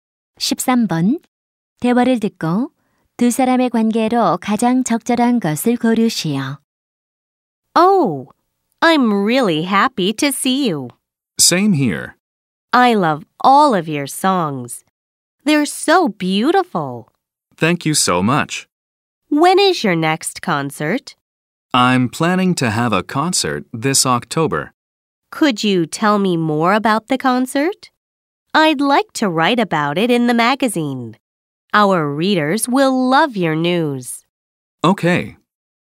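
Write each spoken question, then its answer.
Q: 대화를 듣고 두 사람의 관계로 가장 적절한 것을 고르시오.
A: 가수 - 잡지 기자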